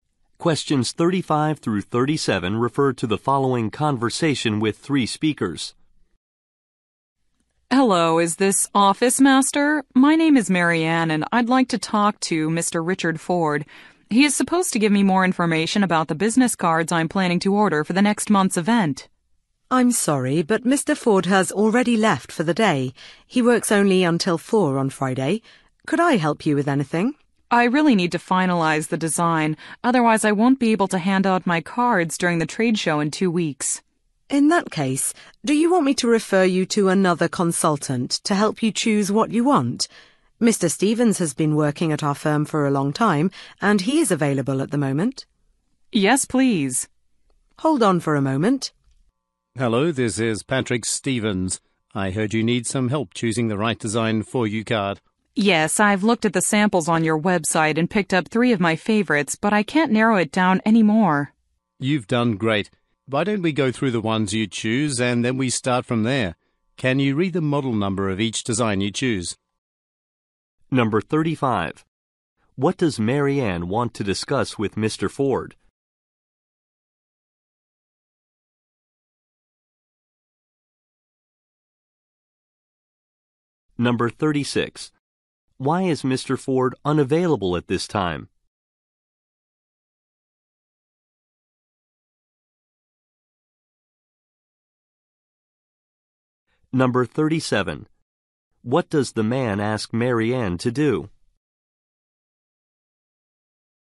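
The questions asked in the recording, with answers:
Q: What does Marianne want to discuss with Mr. Ford?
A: Her business card order

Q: Why is Mr. Ford unavailable at this time?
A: He has left for the day

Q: What does the man ask Marianne to do?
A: Read the model numbers of the designs she chose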